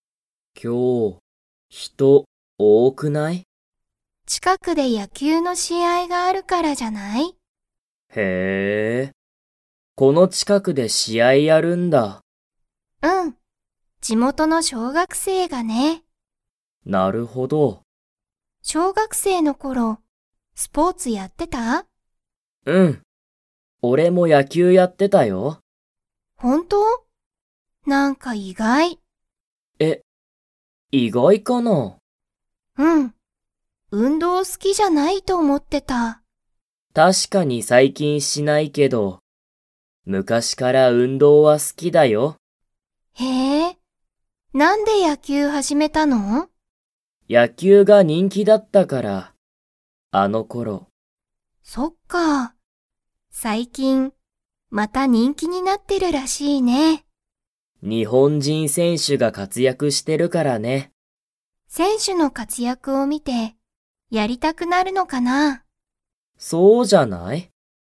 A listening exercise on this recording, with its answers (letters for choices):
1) 今日きょう、誰だれが野球やきゅうの試合しあいをやりますか?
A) タケシ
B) リカ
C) 小学生しょうがくせい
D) 人気にんきの選手せんしゅ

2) タケシは、最近さいきん運動うんどうを 。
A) する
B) しない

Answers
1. C
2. B

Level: Level 4